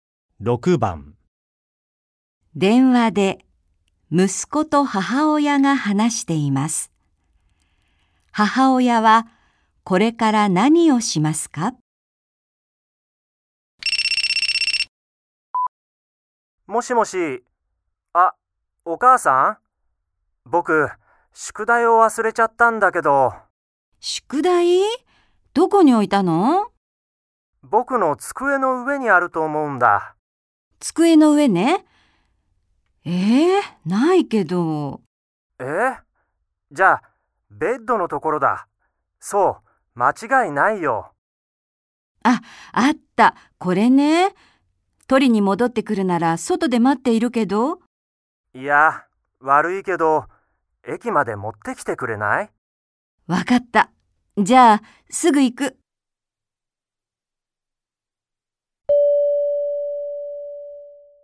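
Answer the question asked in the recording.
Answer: 宿題を駅まで持っていく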